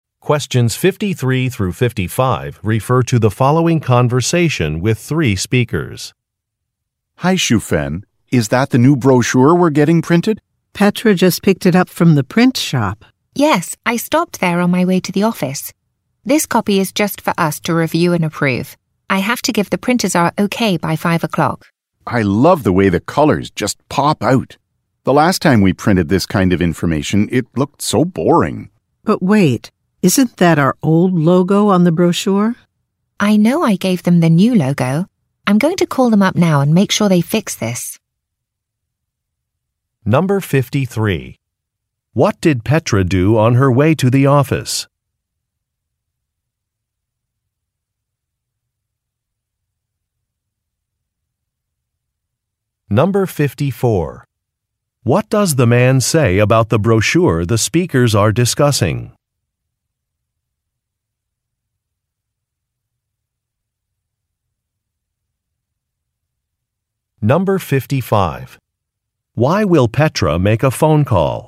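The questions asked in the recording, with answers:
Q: What did Petra do on her way to the office?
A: She picked up the brochure from the print shop.

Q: Why will Petra make a phone call?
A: To have the printers fix the old logo on the brochure.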